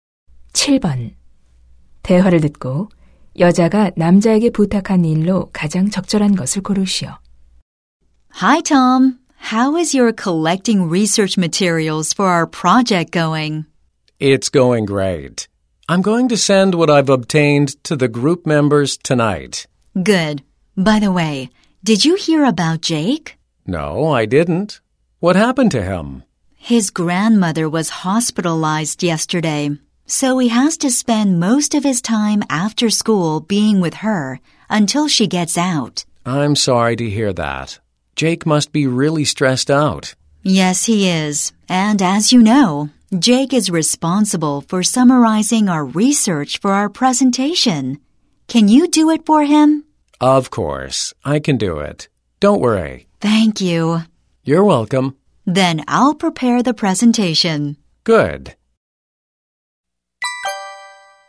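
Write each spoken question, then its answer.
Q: 대화를 듣고 여자가 남자에게 부탁한 일로 가장 적절한 것을 고르시오.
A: 발표를 위해 조사 내용 요약하기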